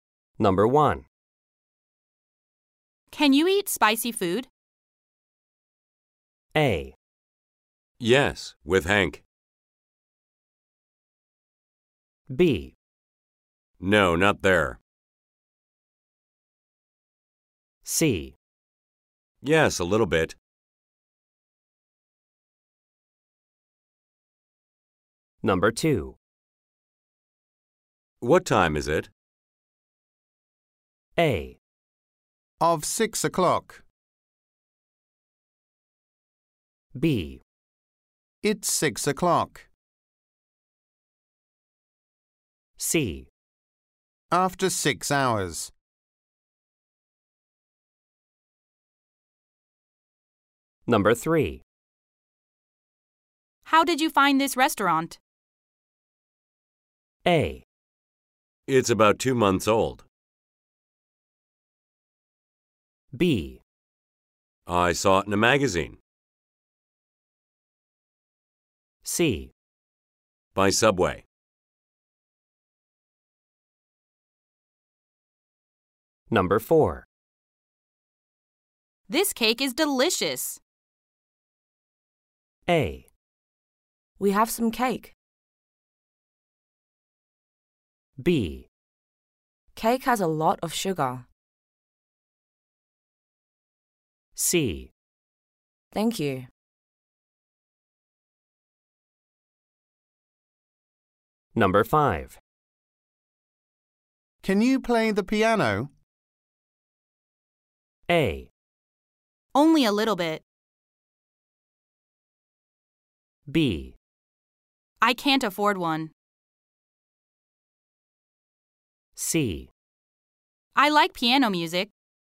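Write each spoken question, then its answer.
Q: Can you eat spicy food?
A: C: Yes, a little bit.

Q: What time is it?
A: B: It's 6 o'clock.

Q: How did you find this restaurant?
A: B: I saw it in a magazine.

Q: This cake is delicious.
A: C: Thank you.

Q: Can you play the piano?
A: A: Only a little bit.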